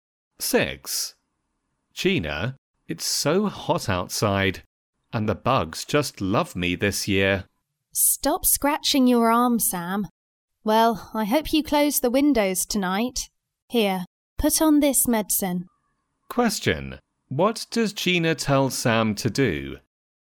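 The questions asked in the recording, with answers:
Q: What does Gina tell Sam to do?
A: Put on some medicine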